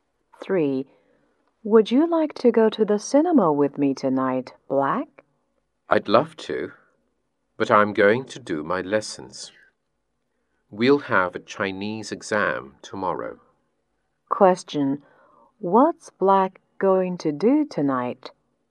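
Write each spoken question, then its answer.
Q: What's Black...going to do tonight?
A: Do his lessons for tomorrow's Chinese exam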